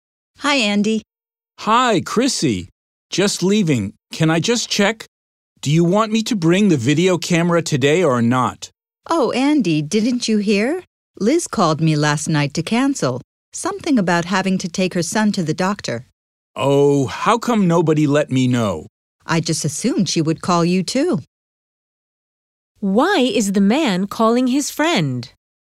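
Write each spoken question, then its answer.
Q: Why is the man calling his friend?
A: To check whether he should bring the video camera today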